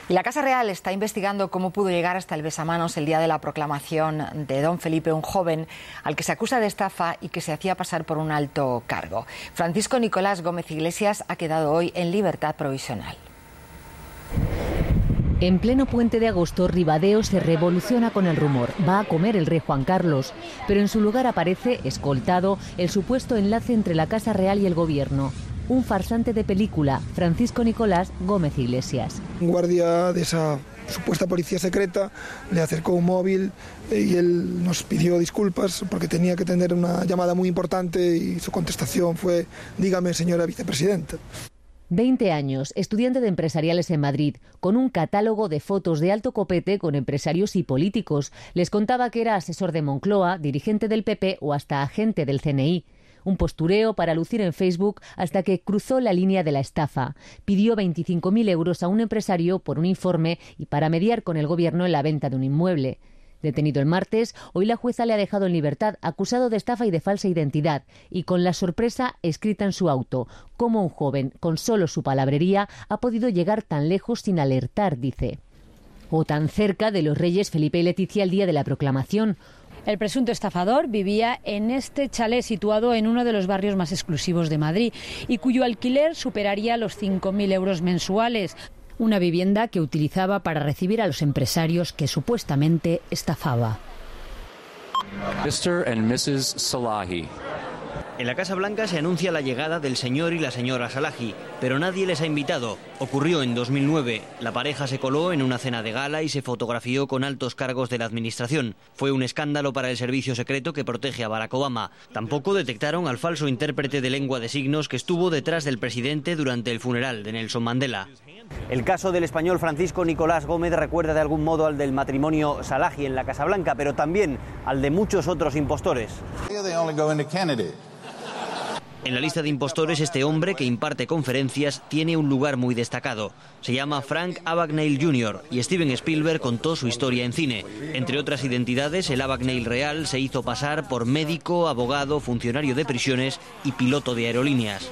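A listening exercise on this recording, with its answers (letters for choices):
Escucha e indica la versión correcta.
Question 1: Francisco Nicolás Gómez no se hizo pasar por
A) agente del CNI.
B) asesor de Moncloa.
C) dirigente del PP.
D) secretario del Rey.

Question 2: En realidad Nicolás es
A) un chófer.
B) un desempleado.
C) un estudiante.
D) un periodista.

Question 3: Frank Abagnale Junior no se hizo pasar por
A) abogado.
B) médico.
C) piloto.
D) profesor.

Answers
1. D
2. C
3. D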